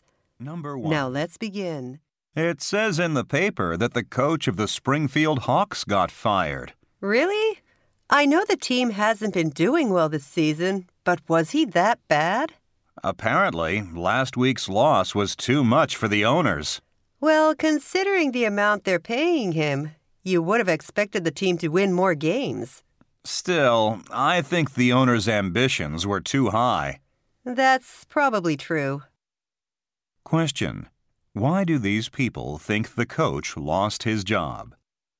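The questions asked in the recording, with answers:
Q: Why do these people think the coach lost his job?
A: The team lost too many games / last week's loss was too much for the owners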